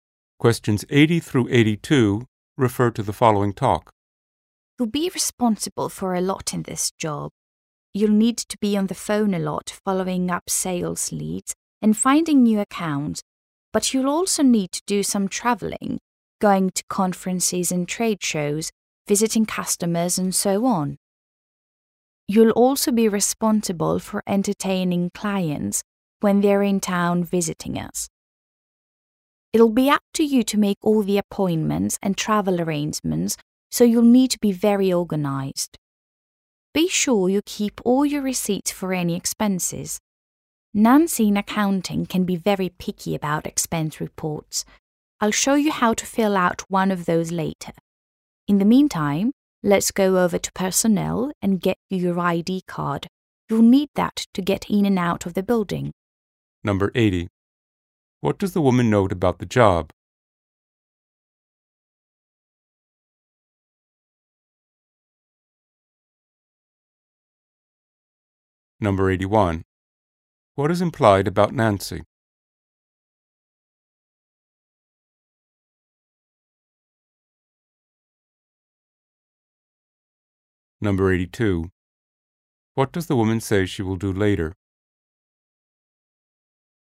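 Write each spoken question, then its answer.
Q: What does the woman note about the job?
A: It involves phone work and travel and requires being organized

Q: What is implied about Nancy?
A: She is picky about expense reports

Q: What does the woman say she will do later?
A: Show how to fill out an expense report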